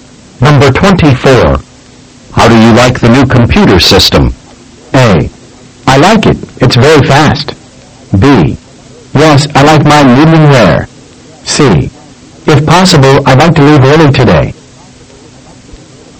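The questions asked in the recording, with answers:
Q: How do you like the new computer system?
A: A: I like it. It's very fast.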